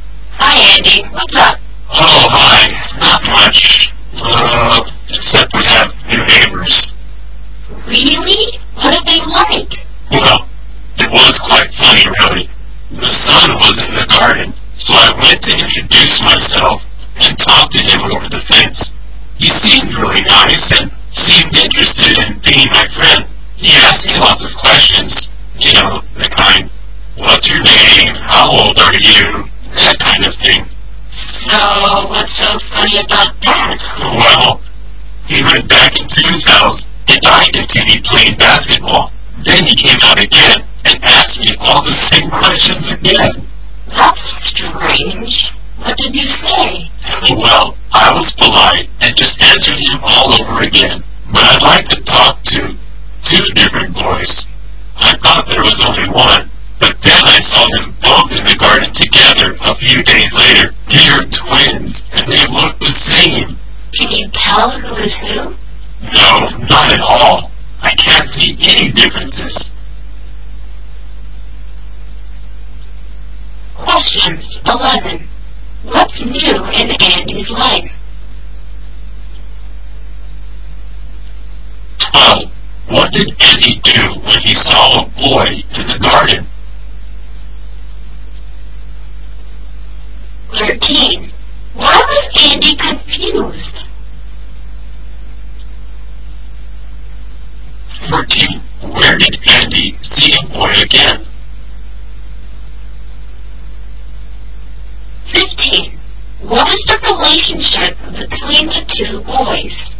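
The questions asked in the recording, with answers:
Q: What's new in Andy's life?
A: He has new neighbors

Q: What did Andy do when he saw a boy in the garden?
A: He introduced himself and talked to him over the fence

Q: Why was Andy confused?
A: The boy asked him the same questions again

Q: where did Andy see a boy again?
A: In the garden

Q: What is the relationship between the two boys?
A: They are twins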